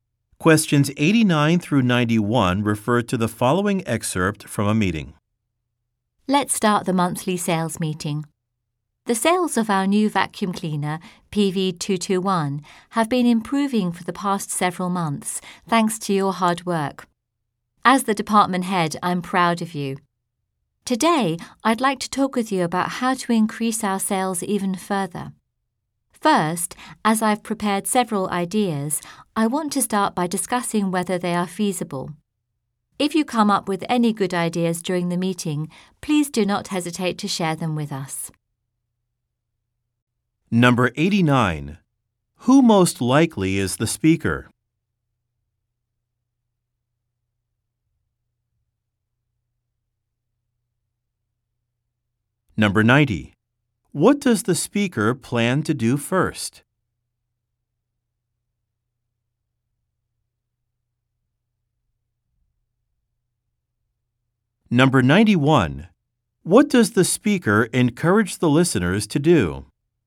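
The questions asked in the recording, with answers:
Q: Who most likely is the speaker?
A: A sales department head

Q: What does the speaker plan to do first?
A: Discuss whether his ideas are feasible

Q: What does the speaker encourage the listeners to do?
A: Share any good ideas they come up with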